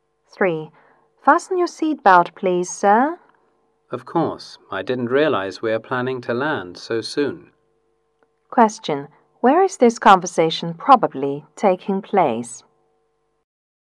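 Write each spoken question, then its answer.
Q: Where is this conversation probably taking place?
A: On a plane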